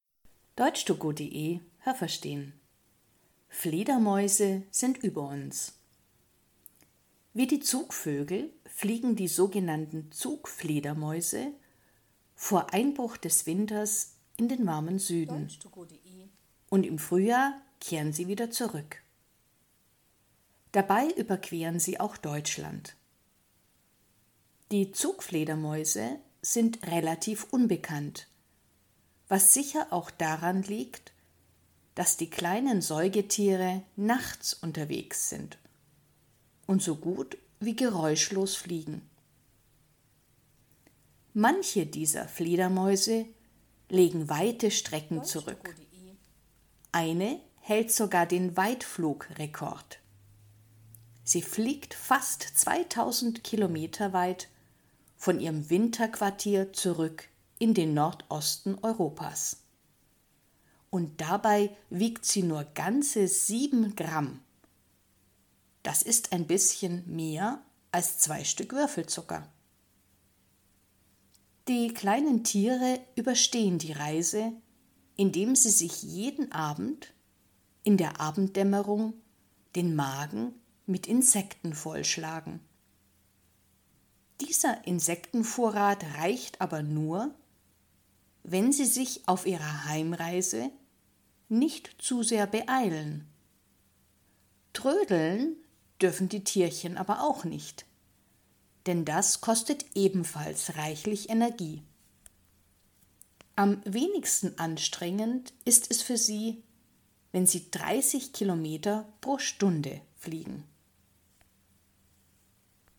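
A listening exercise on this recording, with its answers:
Haben Sie das gehört? Stimmt diese Aussage?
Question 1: Alle Fledermäuse verbringen den Winter in warmen Gebieten.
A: Nein, das habe ich nicht gehört.

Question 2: Zugfledermäuse fliegen nachts und man hört sie fast nicht.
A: Ja, das habe ich gehört.

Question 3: Eine Fledermaus-Art fliegt fast 2.000 km vom Winterquartier zurück in den Nordosten Europas.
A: Ja, das habe ich gehört.

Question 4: Sie ist sehr klein und wiegt nur 17 Gramm, so viel wie zwei Stück Würfelzucker.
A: Nein, das habe ich nicht gehört.

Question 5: Zugfledermäuse überstehen die Reise, ohne etwas zu essen.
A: Nein, das habe ich nicht gehört.

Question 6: Sie dürfen nicht zu schnell, aber auch nicht zu langsam fliegen.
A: Ja, das habe ich gehört.

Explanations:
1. Nur sogenannte Zugfledermäuse tun das. Sie ziehen vor Einbruch des Winters in den Süden (wie die Zugvögel).
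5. Sie essen in der Abenddämmerung sehr viele Insekten, um während des Flugs einen Vorrat zu haben.

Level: B1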